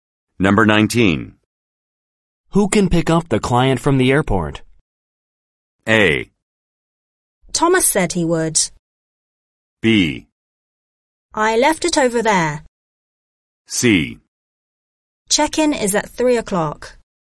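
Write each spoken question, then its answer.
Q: Who can pick up the client from the airport?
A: A: Thomas said he would.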